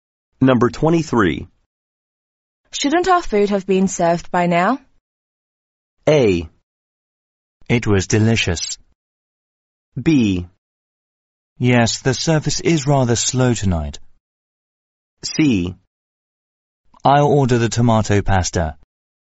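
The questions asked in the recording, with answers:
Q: Shouldn't our food have been served by now?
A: B: Yes, the service is rather slow tonight.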